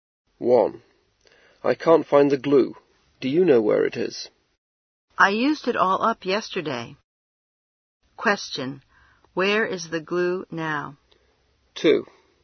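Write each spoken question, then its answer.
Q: Where is the glue now?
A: It's gone; it was all used up yesterday.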